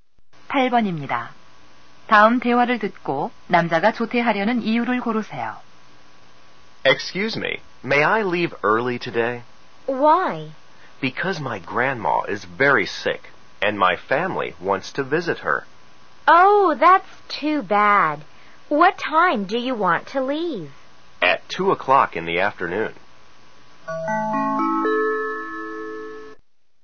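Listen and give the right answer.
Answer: 할머니가 많이 아프셔서 가족과 병문안 가려고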